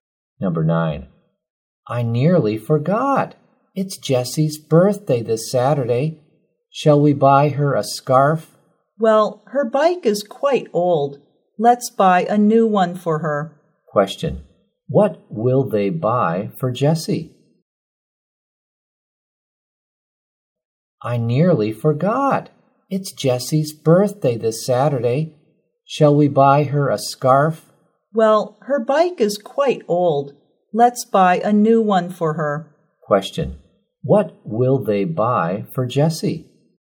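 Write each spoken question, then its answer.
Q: Question. What will they buy for Jessie?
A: A new bike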